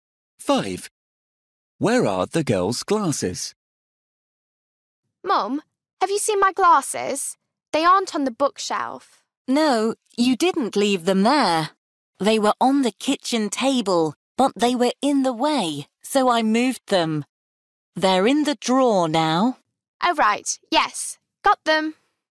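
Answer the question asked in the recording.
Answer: in the drawer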